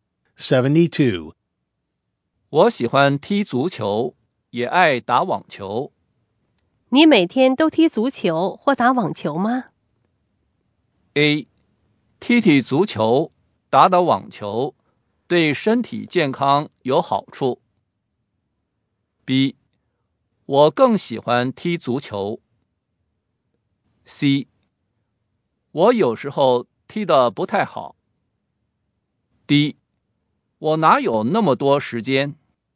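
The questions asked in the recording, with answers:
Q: 我喜欢踢足球,也爱打网球。你每天都踢足球或打网球吗?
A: D: 我哪有那么多时间?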